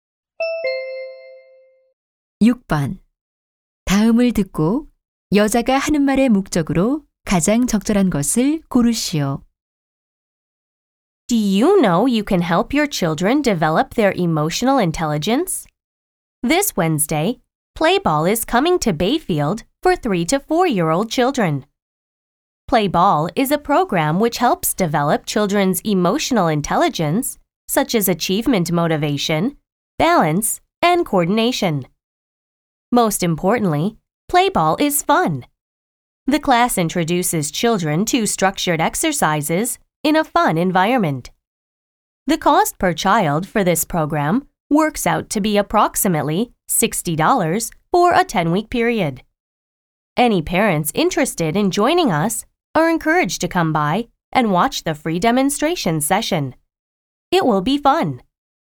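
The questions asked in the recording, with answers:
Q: 번다음을듣고여자가하는말의목적으로가장적절한것을고르시오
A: 어린이 프로그램 Play Ball 홍보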